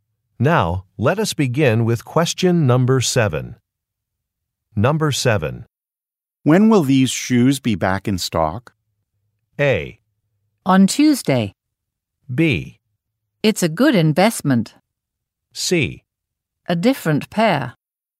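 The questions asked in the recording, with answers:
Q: When will these shoes be back in stock?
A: A: On Tuesday.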